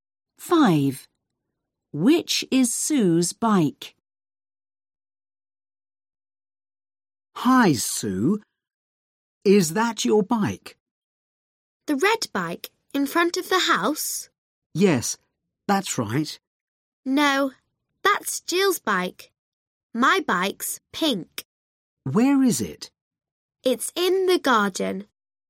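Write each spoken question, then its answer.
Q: Which is Sue's bike?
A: The pink bike in the garden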